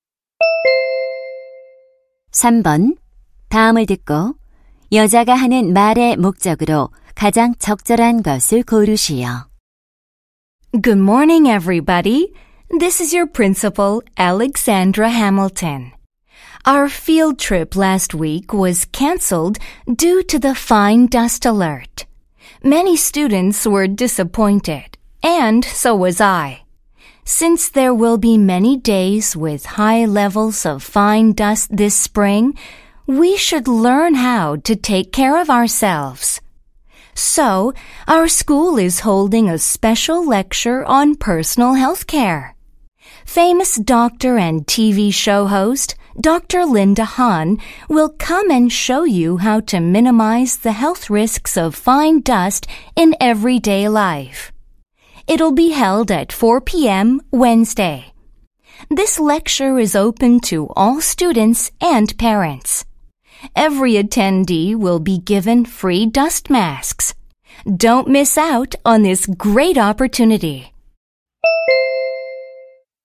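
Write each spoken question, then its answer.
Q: 다음을 듣고 여자가 하는 말의 목적으로 가장 적절한 것을 고르시오.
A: 미세먼지 관련 개인 건강관리 특별 강연을 안내하려고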